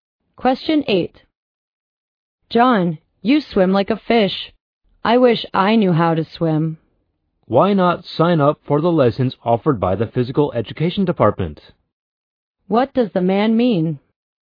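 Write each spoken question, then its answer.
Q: What does the man mean?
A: The woman should sign up for swimming lessons.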